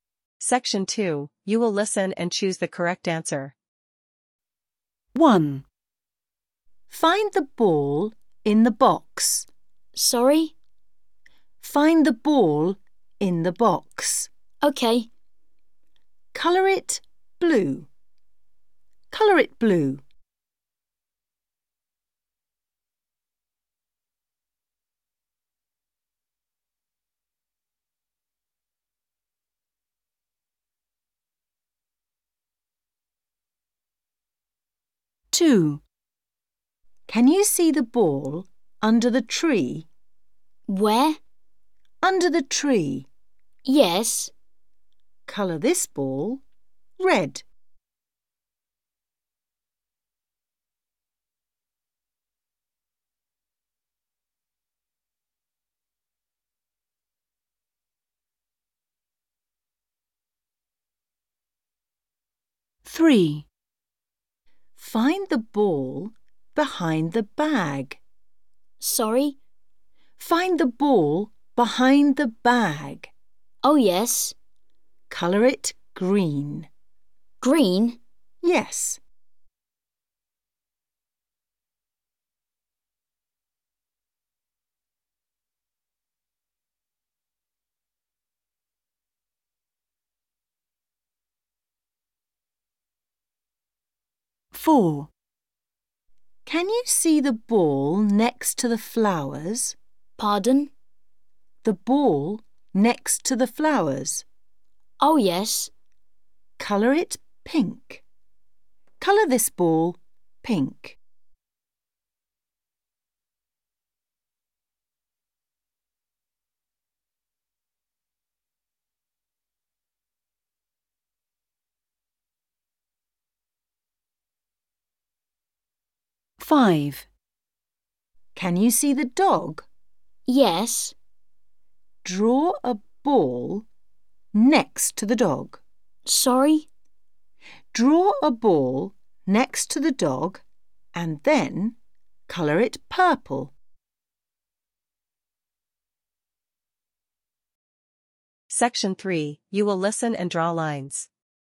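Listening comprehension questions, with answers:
You will listen and choose the correct answer.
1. What color is the ball in the box?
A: blue

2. What color is the ball under the tree?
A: red

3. What color is the ball behind the bag?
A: green

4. What color is the ball next to the flowers?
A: pink

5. What color is the ball drawn next to the dog?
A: purple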